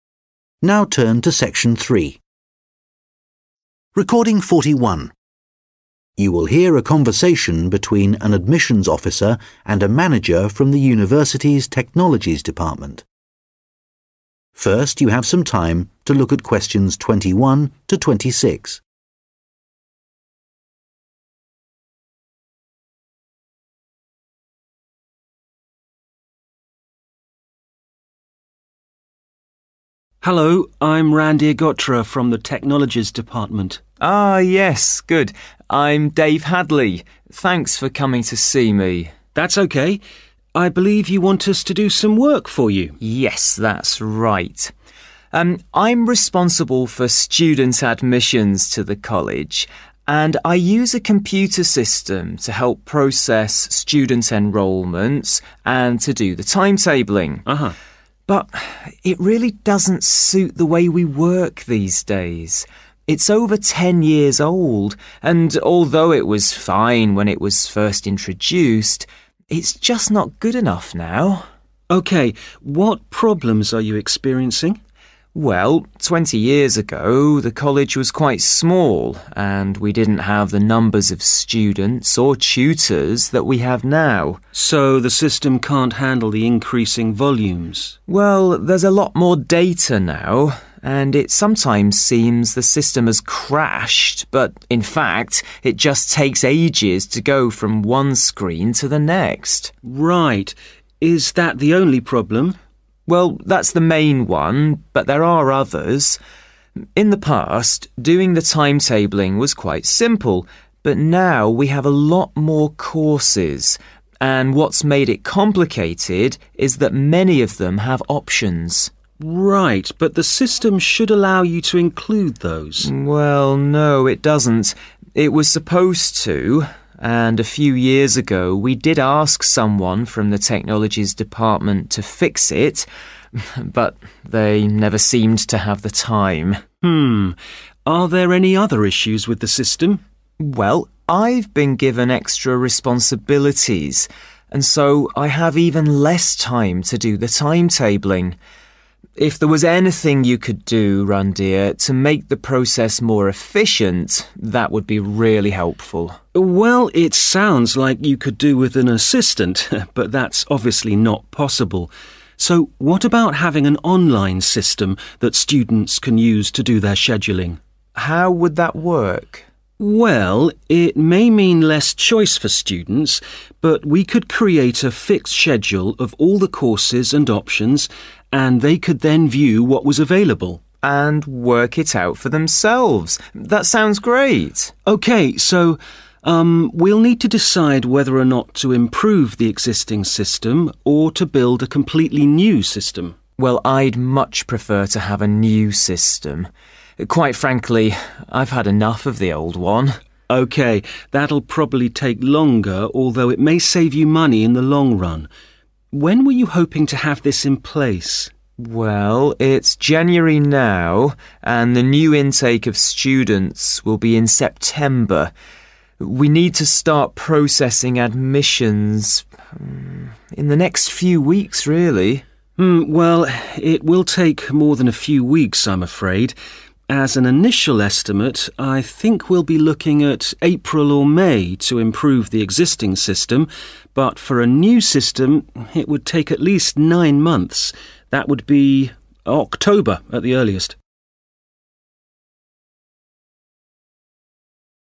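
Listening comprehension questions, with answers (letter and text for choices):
Questions 21-26 Choose the correct letter, A, B or C.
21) Dave Hadley says that the computer system has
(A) too many users.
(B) never worked well.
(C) become outdated.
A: (C) become outdated.

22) The main problem with the computersystem is that it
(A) is too slow.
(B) stops working.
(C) displays incorrect data.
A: (A) is too slow.

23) Timetabling has become an issue because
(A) there is not enough time for anyone to do it.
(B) the system does not handle course options.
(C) the courses are constantly changing.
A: (B) the system does not handle course options.

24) To solve the timetablingissues, Randhir suggests that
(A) students should create their own timetables.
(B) Dave should have someone to assist him.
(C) the number of courses should be reduced.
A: (A) students should create their own timetables.

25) Randhir says that a new system may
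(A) need to be trialled.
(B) still have problems.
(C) be more economical.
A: (C) be more economical.

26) Improvingthe existingsystem will take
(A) a few weeks.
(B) four or five months.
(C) nine months.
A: (B) four or five months.

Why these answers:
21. It's over ten years old and although it was fine when it was first introduced, it is just not good enough now (Nhưng nó thực sự không phù hợp với cách chúng ta làm việc ngày nay. Nó đã hơn mười năm tuổi và dù nó vẫn ổn khi lần đầu tiên được giới thiệu, nhưng bây giờ nó không đủ tốt)
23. In the past, doing the timetable was quite simple but now we have a lot more courses and what's made it complicated is that many of them have options (Trước đây, việc lập thời gian biểu khá đơn giản nhưng bây giờ chúng ta có nhiều khóa học hơn và điều khiến nó trở nên phức tạp là nhiều khóa học trong số đó có các tùy chọn)
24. Well it sounds like you could do it with an assistant but that's obviously not possible, so what about having an online system that students can use to do their scheduling (vậy còn việc có một hệ thống trực tuyến mà sinh viên có thể sử dụng để lập lịch trình thì sao?)
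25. OK – that'll probably take longer although it may save you money in the long run (OK – điều đó có thể sẽ mất nhiều thời gian hơn mặc dù về lâu dài nó có thể giúp bạn tiết kiệm tiền)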